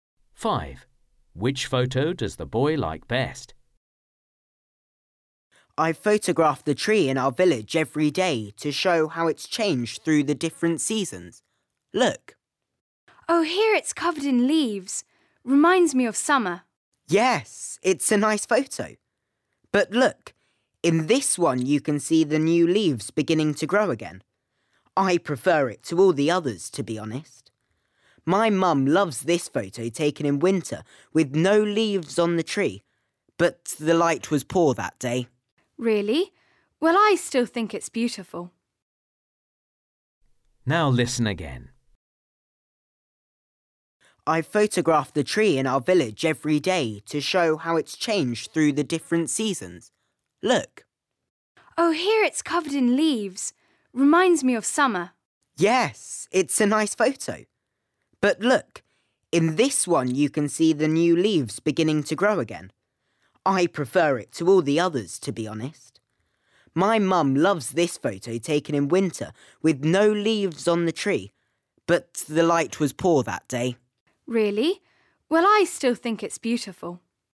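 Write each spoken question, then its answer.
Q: Which photo does the boy like best?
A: The one with new leaves beginning to grow (spring)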